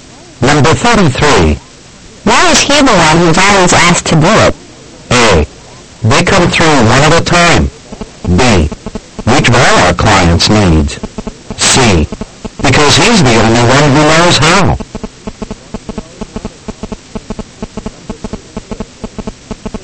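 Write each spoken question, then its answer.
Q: Why is he the one who's always asked to do it?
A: C: Because he's the only one who knows how.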